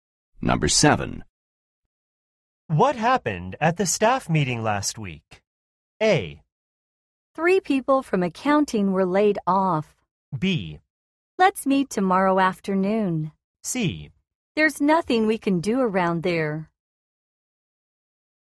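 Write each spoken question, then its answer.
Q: What happened at the staff meeting last week?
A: A: 3 people from accounting were laid off.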